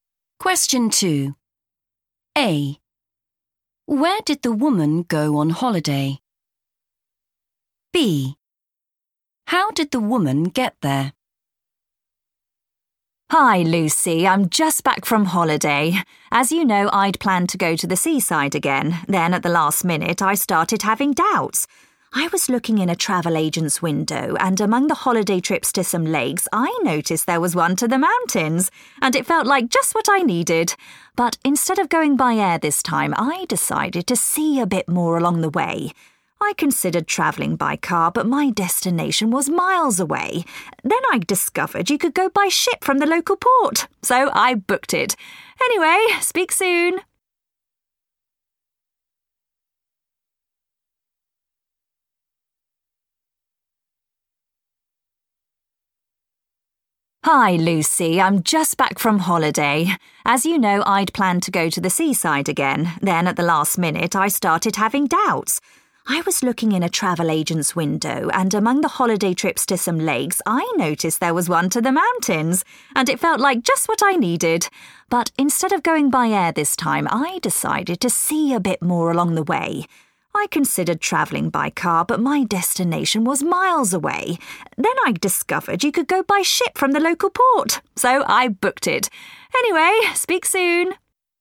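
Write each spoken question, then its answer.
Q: Where did the woman go on holiday?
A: the mountains

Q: How did the woman get there?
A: by ship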